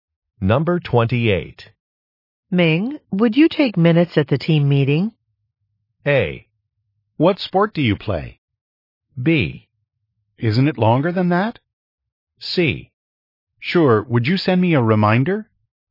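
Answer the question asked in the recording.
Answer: C: Sure, would you send me a reminder?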